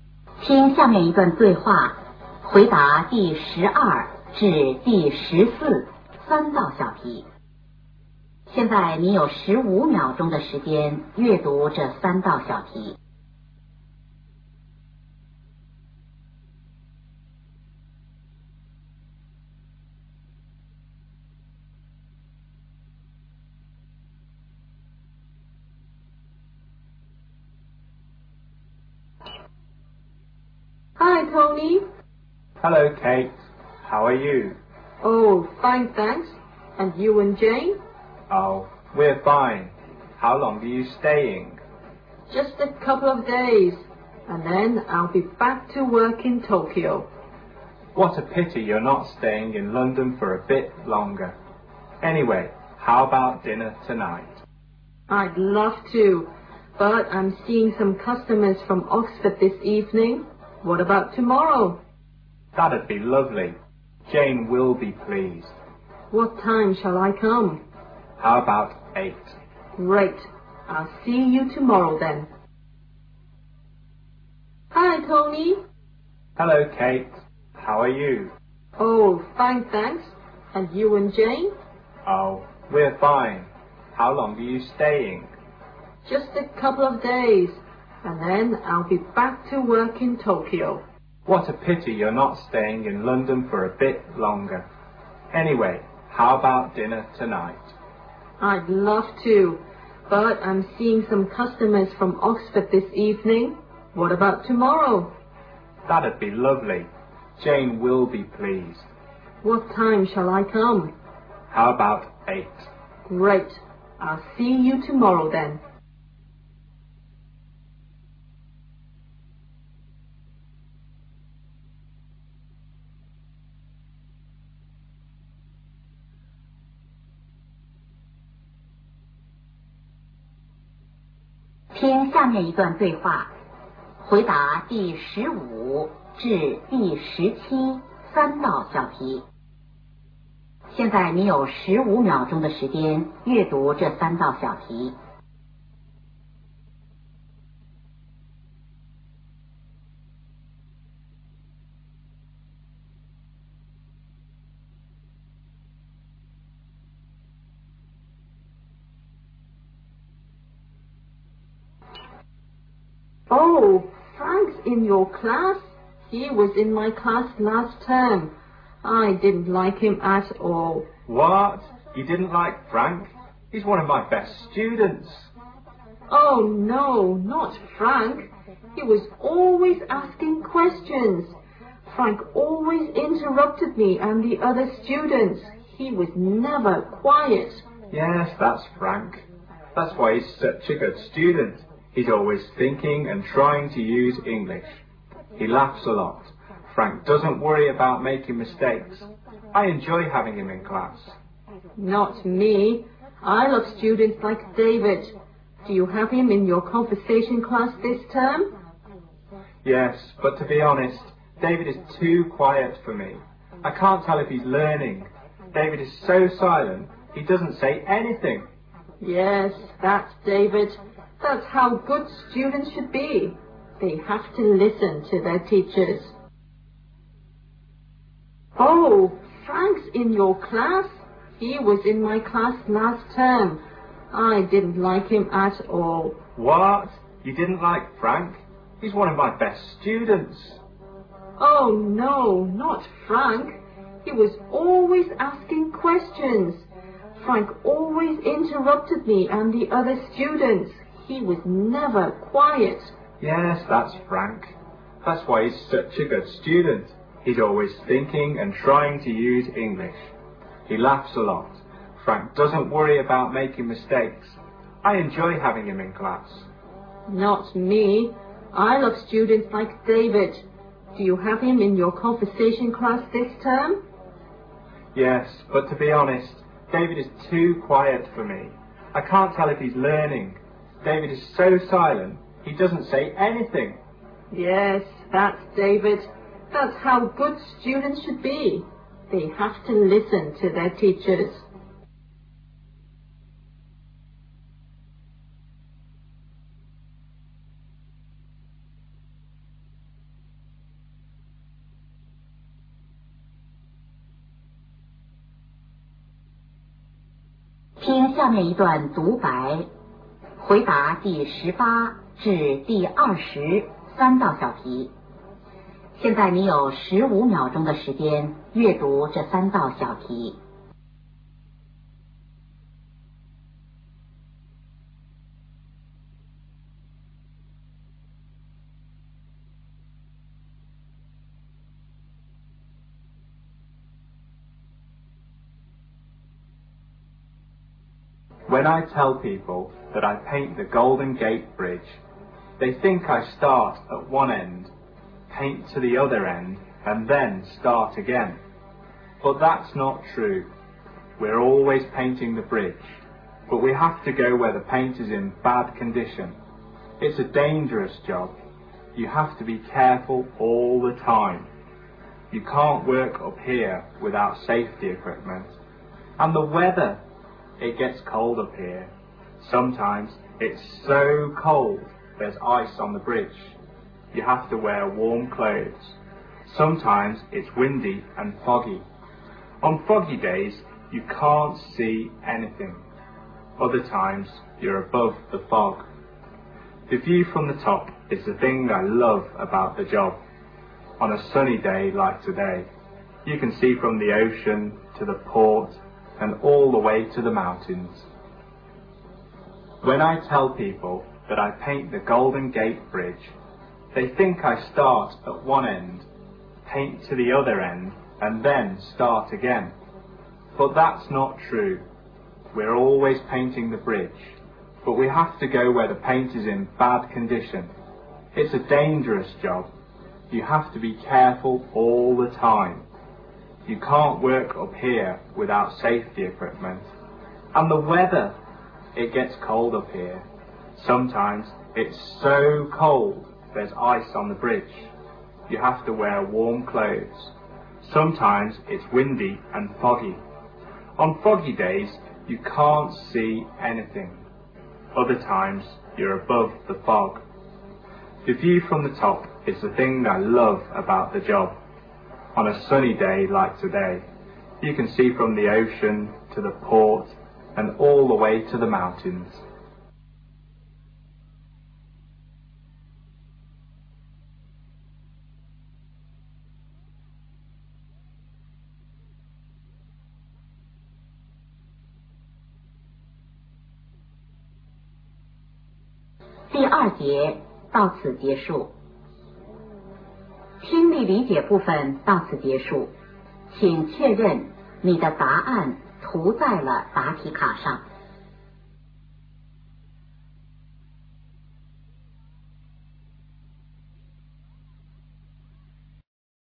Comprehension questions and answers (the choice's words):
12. Where does the woman work?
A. Tokyo.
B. London.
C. Oxford.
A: Tokyo.

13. What are the speakers going to do together tomorrow evening?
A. Visit Jane.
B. Have dinner.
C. See customers.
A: Have dinner.

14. Who is probable Jane?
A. Tony's customer.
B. Tony's boss.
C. Tony's wife.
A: Tony's wife.

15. Who is the woman talking to?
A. A student.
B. A teacher.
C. A secretary.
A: A teacher.

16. What does the man say about Frank?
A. He is quiet.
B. He is active.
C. He is honest.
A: He is active.

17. What does the woman think good student should be like?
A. They should ask questions.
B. They should pay attention in class.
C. They should not be afraid of making mistakes.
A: They should pay attention in class.

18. What does the man do?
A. A painter.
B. An engineer.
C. A weatherman.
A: A painter.

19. What does the man say about his job?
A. Easy.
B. Tiring.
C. Dangerous.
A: Dangerous.

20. Why does the man love his job?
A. He can stay in the mountains.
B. He can enjoy the beautiful view.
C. He can experience different weather.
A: He can enjoy the beautiful view.

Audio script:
W: Hi, Tony!
M: Hello, Kate! How are you?
W: Oh, fine, thanks. And you and Jane?
M: Oh, we're fine. How long are you staying?
W: Just a couple of days. And then I'll be back to work in Tokyo.
M: What a pity you are not staying in London for a bit longer. Anyway, how about dinner tonight?
W: I'd love to, but I'm seeing some customers from Oxford this evening. What about tomorrow?
M: That'd be lovely. Jane will be pleased.
W: What time shall I come?
M: How about eight?
W: Great. I'll see you tomorrow then.
W: Oh, Frank's in your class? He was in my class last term. I didn't like him at all.
M: What? You didn't like Frank? He's one of my best students.
W: Oh, no. Not Frank! He was always asking questions. Frank always interrupted me and the other students. He was never quiet.
M: Yes, that's Frank. That's why he is such a good student. He is always thinking and trying to use English. He laughs a lot. Frank doesn't worry about making mistakes. I enjoy having him in class.
W: Not me. I love students like David. Do you have him in your conversation class this term?
M: Yes, but to be honest, David is too quiet for me. I can't tell if he's learning. David is so silent. He doesn't say anything.
W: Yes, that's David. That's how good students should be. They have to listen to their teachers.
M: When I tell people that I paint the Golden Gate Bridge, they think I start at one end, paint to the other end, and then start again. But that's not true. We are always painting the bridge. But we have to go where paint is in bad condition. It's a dangerous job. You have to be careful all the time. You can't work or appear without safety equipment. And the weather, it gets colder up here. Sometimes it's so cold there's ice on the bridge. You have to wear warm clothes. Sometimes it's windy and foggy. On foggy days, you can't see anything. Other times, you are both the fog. The view from the top is the thing that I love about the job. On a sunny day like today, you can see from the ocean to the port and all the way to the mountains.
答案: